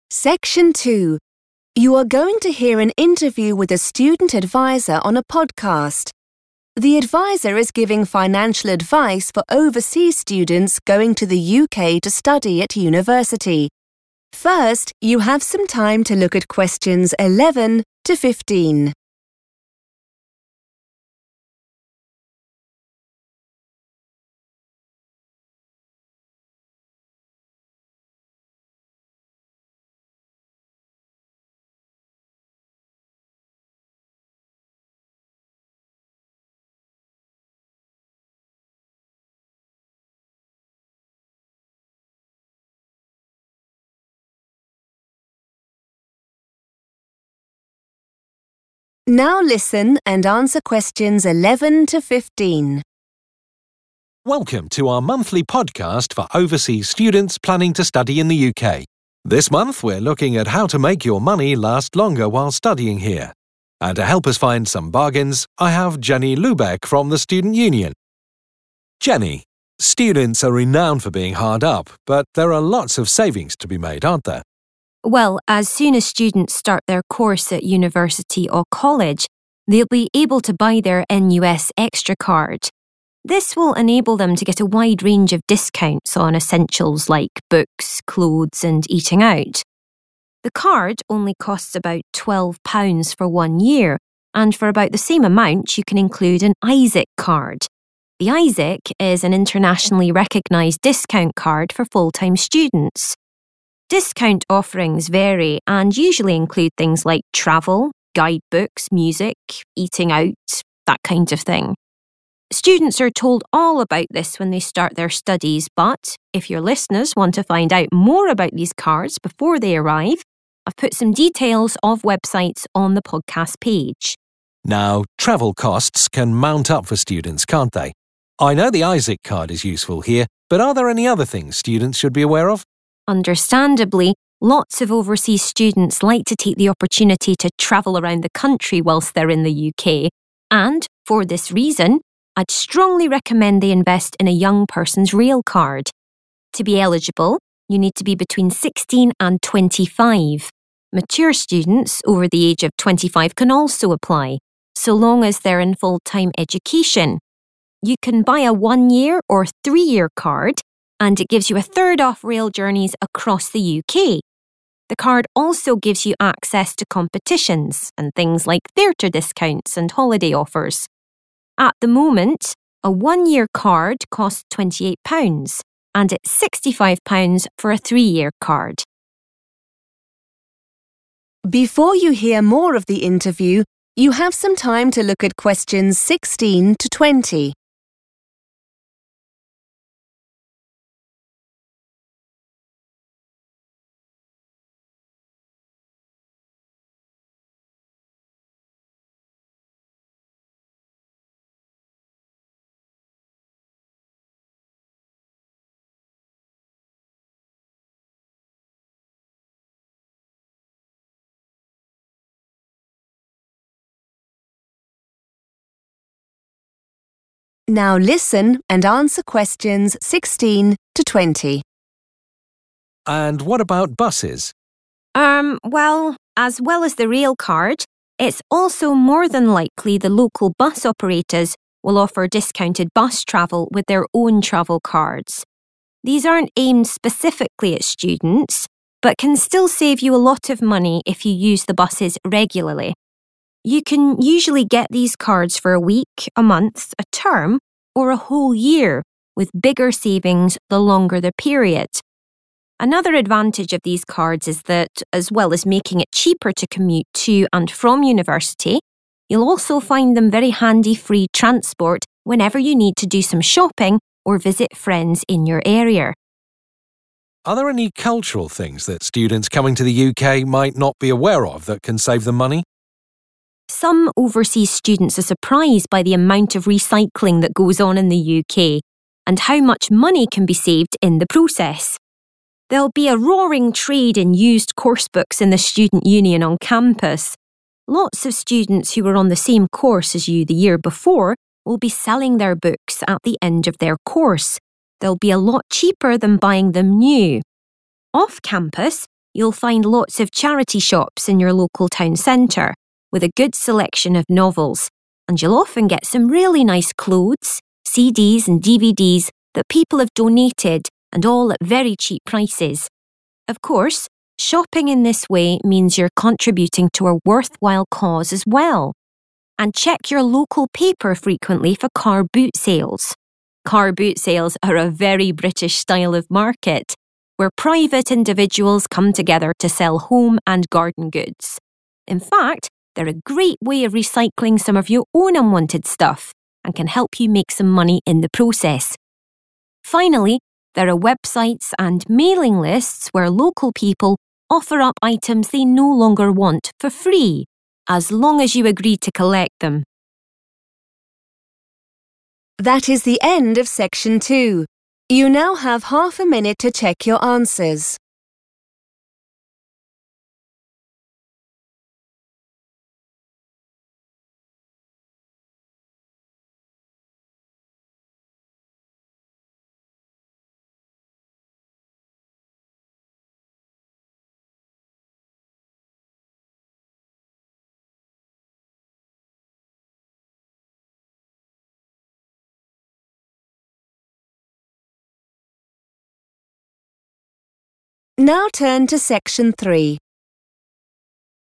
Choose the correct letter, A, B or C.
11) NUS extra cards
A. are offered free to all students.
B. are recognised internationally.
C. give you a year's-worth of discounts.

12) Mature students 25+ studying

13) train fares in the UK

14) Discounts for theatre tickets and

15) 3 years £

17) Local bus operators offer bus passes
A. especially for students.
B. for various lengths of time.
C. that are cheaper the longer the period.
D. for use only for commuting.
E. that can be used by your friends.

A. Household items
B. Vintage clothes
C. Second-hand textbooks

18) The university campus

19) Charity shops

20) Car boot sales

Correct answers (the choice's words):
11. give you a year's-worth of discounts.
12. full time
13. a third off / one third off
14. holiday offers
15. 65
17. for various lengths of time.
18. Second-hand textbooks
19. Vintage clothes
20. Household items

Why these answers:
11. The correct answer is C because the speaker explains that the NUS extra card has a cost for a one-year period. This implies that the benefits and savings provided by the card last for that entire year. While the speaker mentions another card (the ISIC) is recognized internationally, the NUS extra card itself is specifically noted for its one-year duration and cost. It is not free, as it costs about £12.
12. The correct answer is "full time" because the speaker, Jenny, explains the rules for getting a railcard. While the card is mainly for young people, older students (called mature students) can also get it if they are studying in a "full-time education" program. This matches the note about mature students aged 25 or older.
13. The correct answer is based on the information Jenny provides about the Young Person's railcard. She explains that having this card allows students to pay a lower price for their travel, specifically stating that they get 'a third off' the cost of train trips throughout the UK.
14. The correct answer is "holiday offers" because the speaker lists various benefits of having a Young Person's railcard. Besides giving students cheaper train tickets, she mentions that the card provides access to contests, lower prices for the theater, and deals for holidays.
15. The correct answer is £65 because the speaker directly mentions the specific price for different types of railcards. She notes that while a card for one year is cheaper, the version that is valid for three years has a price of £65.
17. The correct answer is B and C because the speaker explains that bus cards are available for various durations, such as a week, a month, a term, or even a whole year (various lengths of time). Additionally, she mentions that you get 'bigger savings' the longer the card lasts, which means it is cheaper per day when you buy it for a longer period.
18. The correct answer is C because the speaker mentions that the student union, which is located on the university campus, has a lot of buying and selling of used books. These are books that students from previous years no longer need. Using the word "used coursebooks" is another way to say second-hand textbooks.
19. The correct answer is B because charity shops are mentioned as a great place to find 'really nice clothes' that people have donated. Since clothes in charity shops are used and often older, they fit the description of vintage or second-hand clothing. The speaker mentions that you can buy these items at 'very cheap prices' in your local town centre.
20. The correct answer is A because the speaker describes car boot sales as places where people sell things for their houses and gardens. The phrase 'home and garden goods' used in the transcript is a synonym for 'household items.'

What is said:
Presenter: Welcome to our monthly podcast for overseas students planning to study in the UK. This month we're looking at how to make your money last longer whilst studying here. And to help us find some bargains I have Jenny Lubeck from the student union. Jenny, students are renowned for being hard up but there are lots of savings to be made, aren't there?
Jenny: Well, as soon as students start their course at university or college they'll be able to buy their NUS extra card. This will enable them to get a wide range of discounts on essentials like books, clothes and eating out. The card only costs about £12 for one year and for about the same amount you can include an ISIC card. The ISIC is an internationally recognised discount card for full-time students. Discount offerings vary and usually include things like travel, guidebooks, music, eating out – that kind of thing. Students are told all about this when they start their studies but if your listeners want to find out more about these cards before they arrive I've put some details of websites on the podcast page.
Presenter: Now travel costs can mount up for students, can't they? I know the ISIC card is useful here but are there any other things students should be aware of?
Jenny: Understandably lots of overseas students like to take the opportunity to travel around the country whilst they're in the UK and for this reason I'd strongly recommend they invest in a Young Person's railcard. To be eligible you need to be between 16 and 25 ... mature students over the age of 25 can also apply so long as they're in full-time education. You can buy a one-year or three-year card, and it gives you a third off rail journeys across the UK. The card also gives you access to competitions and things like theatre discounts and holiday offers. At the moment, a one-year card costs £28, and it's £65 for a three-year card.
Presenter: And what about buses?
Jenny: Erm, well, as well as the railcard, it's also more than likely the local bus operators will offer discounted bus travel with their own travel cards. These aren't aimed specifically at students but can still save you a lot of money if you use the buses regularly. You can usually get these cards for a week, a month, a term or a whole year with bigger savings the longer the period. Another advantage of these cards is that as well as making it cheaper to commute to and from university you'll also find them very handy free transport whenever you need to do some shopping or visit friends in your area.
Presenter: Are there any cultural things that students coming to the UK might not be aware of that can save them money?
Jenny: Some overseas students are surprised by the amount of recycling that goes on in the UK and how much money can be saved in the process. They'll be a roaring trade in used coursebooks in the student union on campus. Lots of students who were on the same course as you the year before will be selling their books at the end of their course – they'll be a lot cheaper than buying them new. Off campus you'll find lots of charity shops in your local town centre with a good selection of novels and you'll often get some really nice clothes, CDs and DVDs that people have donated and all at very cheap prices. Of course, shopping in this way means you're contributing to a worthwhile cause as well. And check your local paper frequently for car boot sales. Car boot sales are a very British style of market where private individuals come together to sell home and garden goods. In fact they're a great way of recycling some of your own unwanted stuff and can help you make some money in the process. Finally there are websites and mailing lists where local people offer up items they no longer want, for free – as long as you agree to collect them ...